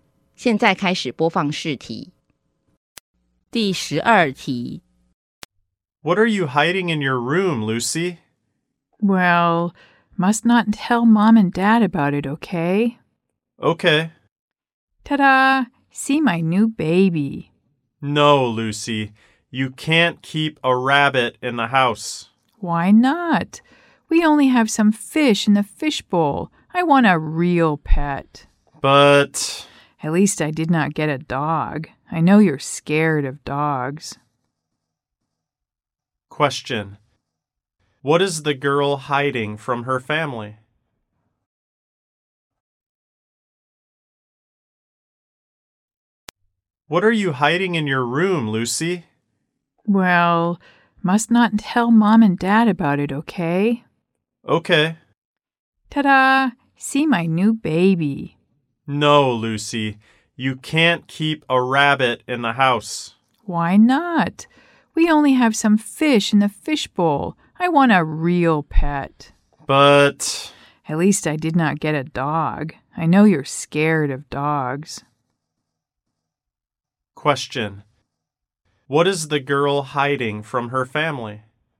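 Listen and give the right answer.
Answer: A rabbit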